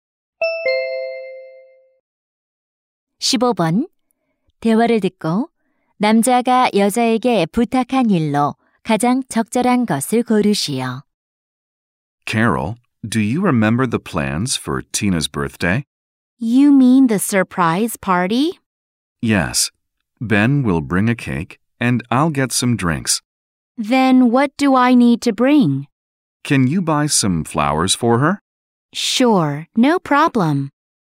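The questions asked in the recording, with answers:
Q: 남자가 여자에게 부탁한 일로 가장 적절한 것을 고르시오.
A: 꽃 사 오기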